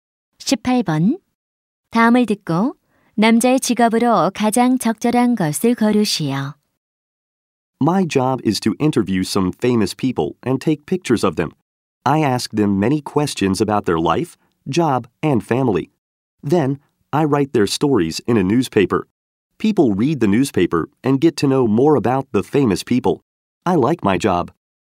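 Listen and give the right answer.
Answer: 신문 기자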